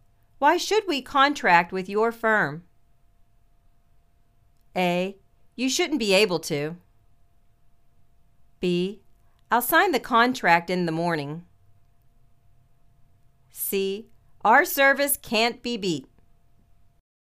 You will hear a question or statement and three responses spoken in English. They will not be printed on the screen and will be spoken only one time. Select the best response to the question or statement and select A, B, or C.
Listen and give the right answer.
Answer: Our service can't be beat.